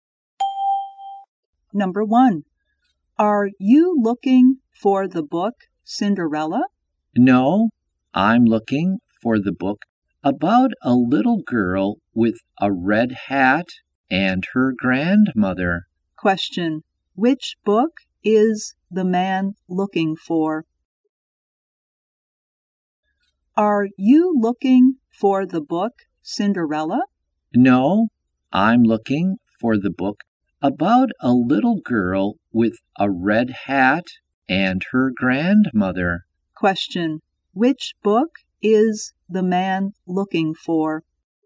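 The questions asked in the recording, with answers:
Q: Question, which book is the man looking for?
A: Little Red Riding Hood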